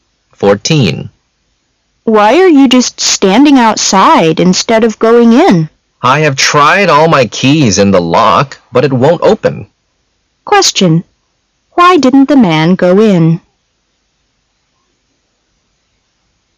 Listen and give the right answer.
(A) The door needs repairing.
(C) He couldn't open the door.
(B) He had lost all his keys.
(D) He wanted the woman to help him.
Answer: (C) He couldn't open the door.

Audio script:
[解析] W: Why are you just standing outside instead of going in? M: I have tried all my keys in the lock, but it won't open. Q: Why didn't the man go in?